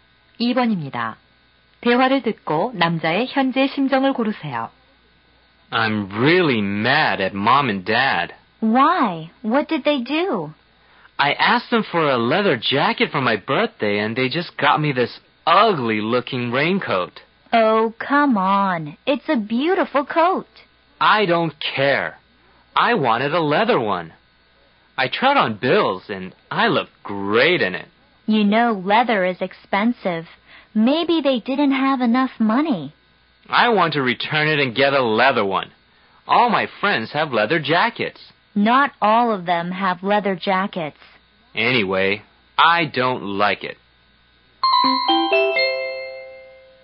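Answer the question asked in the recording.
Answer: 화가 남 (불만스러움)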